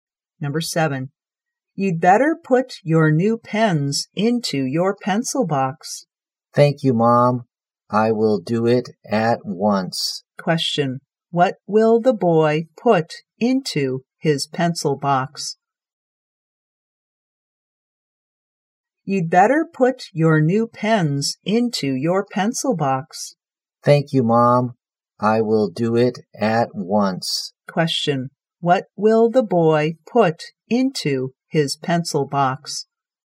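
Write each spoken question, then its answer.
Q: Question, what will the boy put into his pencil box?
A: His new pens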